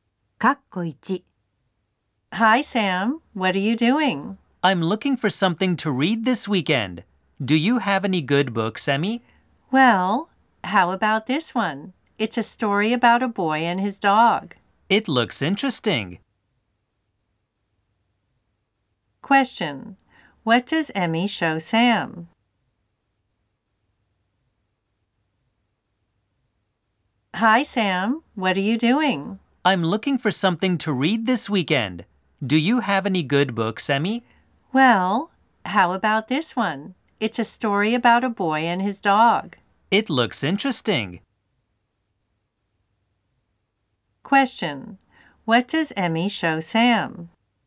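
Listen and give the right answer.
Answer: A book (a story about a boy and his dog)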